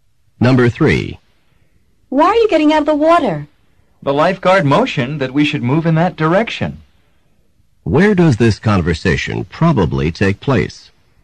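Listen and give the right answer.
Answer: At a beach or pool.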